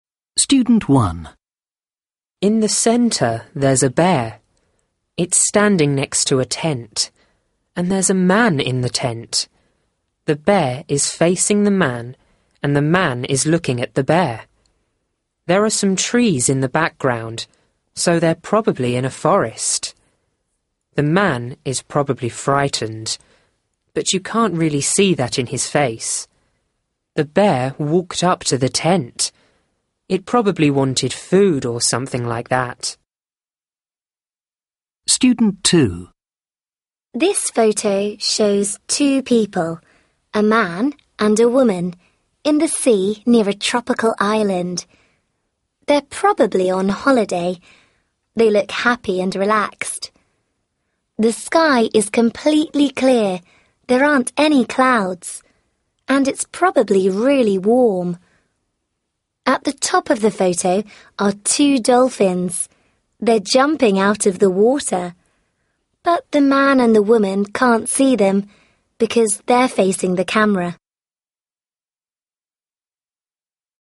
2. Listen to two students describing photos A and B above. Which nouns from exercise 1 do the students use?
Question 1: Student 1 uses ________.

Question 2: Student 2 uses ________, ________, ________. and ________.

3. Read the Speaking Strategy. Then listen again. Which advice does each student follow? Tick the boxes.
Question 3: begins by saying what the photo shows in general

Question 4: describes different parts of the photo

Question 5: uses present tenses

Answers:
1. trees
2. sea, sky, clouds and water
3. student 2
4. both
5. both

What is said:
Student 1 In the centre, there's a bear. It's standing next to a tent. And there's a man in the tent. The bear is facing the man and the man is looking at the bear. There are some trees in the background, so they're probably in a forest. The man is probably frightened, but you can't really see that in his face. The bear walked up to the tent. It probably wanted food, or something like that.
Student 2 This photo shows two people – a man and a woman – in the sea near a tropical island. They're probably on holiday. They look happy and relaxed. The sky is completely clear – there aren't any clouds – and it's probably really warm. At the top of the photo are two dolphins. They're jumping out of the water. But the man and the woman can't see them, because they're facing the camera.
Photo A: